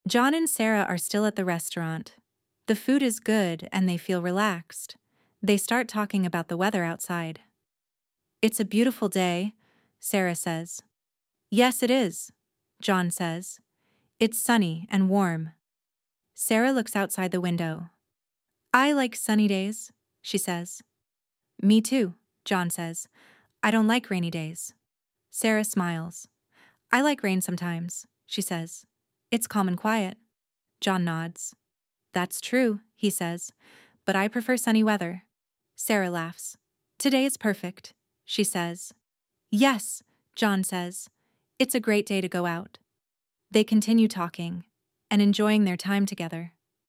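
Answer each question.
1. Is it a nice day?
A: Yes, it is a beautiful day.

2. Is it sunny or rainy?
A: It is sunny.

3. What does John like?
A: Sunny days.

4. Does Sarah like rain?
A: Yes, sometimes.

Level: Inglês Básico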